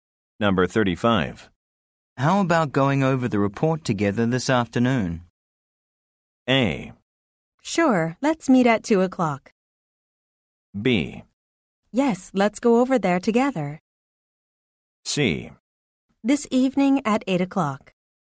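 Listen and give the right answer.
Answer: A: Sure, let's meet at 2 o'clock.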